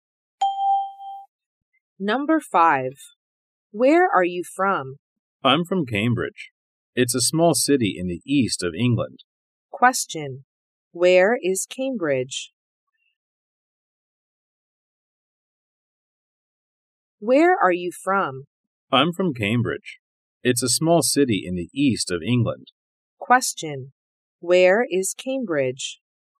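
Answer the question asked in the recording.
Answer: In the east of England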